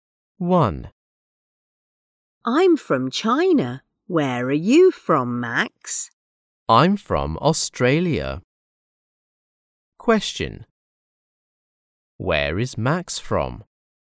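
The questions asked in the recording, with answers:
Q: Where is Max from?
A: Australia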